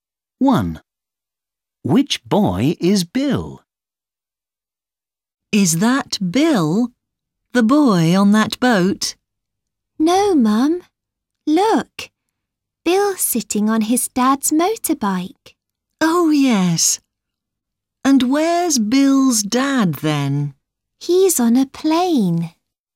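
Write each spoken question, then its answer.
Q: Which boy is Bill?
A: the boy sitting on his dad's motorbike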